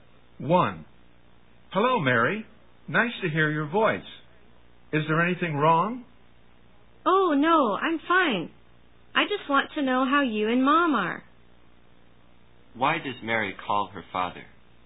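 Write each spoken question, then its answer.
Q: Why does Mary call her father?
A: To find out how her parents are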